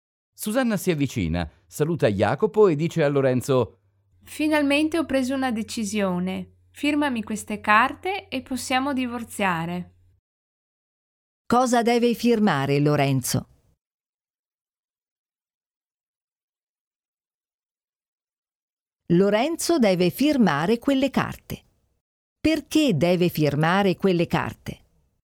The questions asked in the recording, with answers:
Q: Perché deve firmare quelle carte?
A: Deve firmare quelle carte per poter divorziare.